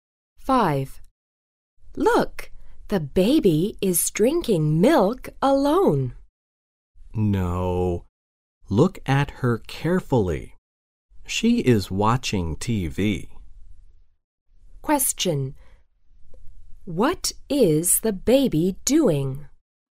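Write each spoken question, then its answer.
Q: What is the baby doing?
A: Watching TV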